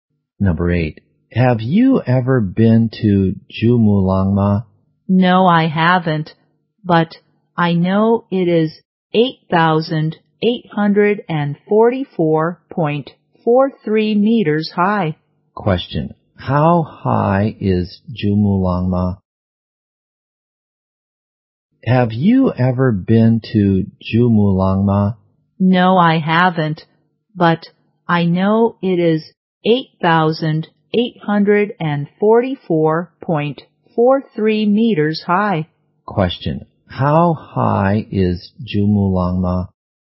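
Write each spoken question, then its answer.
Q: How high is Jumulangma?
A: 8,844.43 meters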